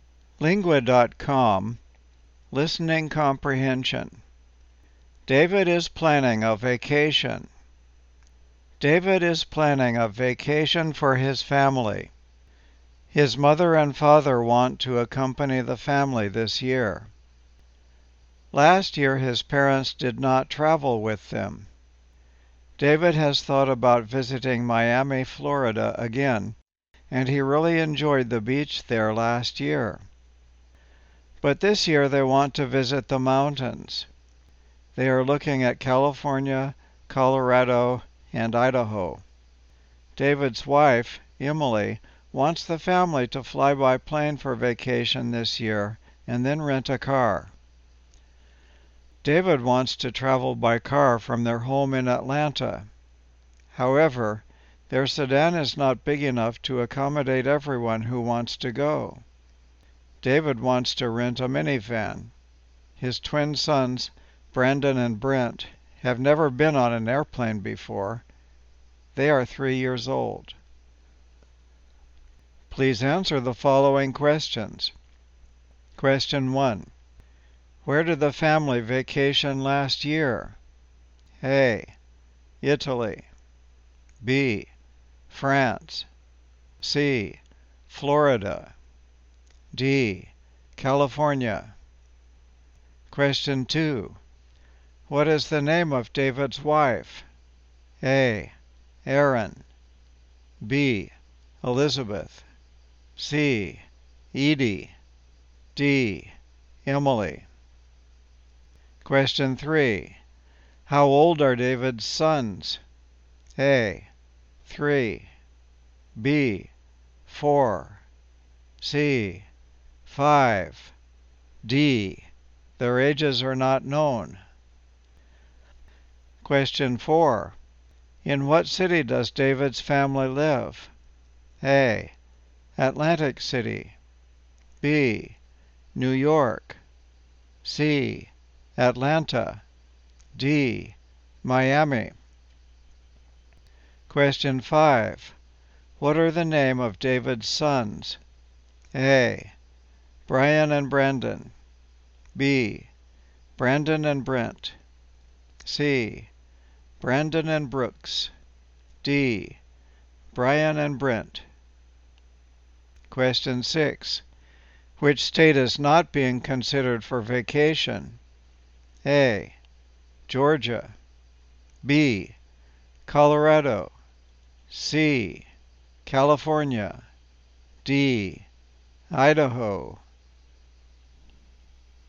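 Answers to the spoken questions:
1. C: Florida
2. D: Emily
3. A: 3
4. C: Atlanta
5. B: Brandon and Brent
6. A: Georgia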